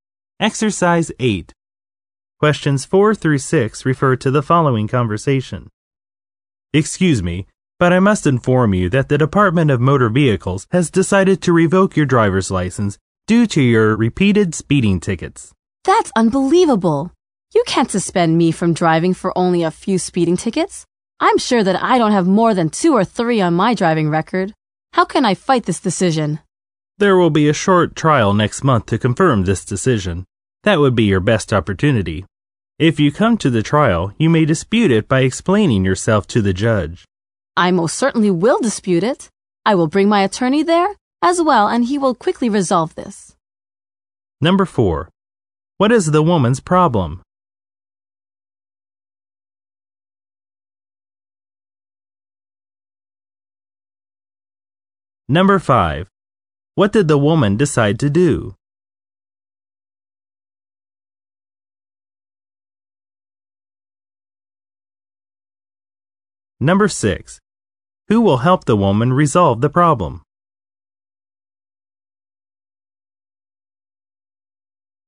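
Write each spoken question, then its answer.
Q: What is the woman's problem?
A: Her driver's license is being revoked for speeding tickets

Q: What did the woman decide to do?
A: Dispute the decision at the trial

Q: Who will help the woman resolve the problem?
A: Her attorney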